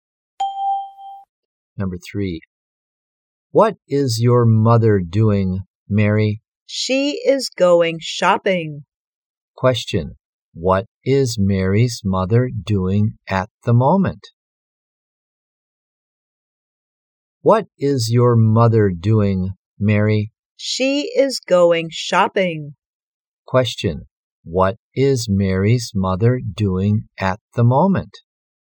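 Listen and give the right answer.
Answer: She is going shopping.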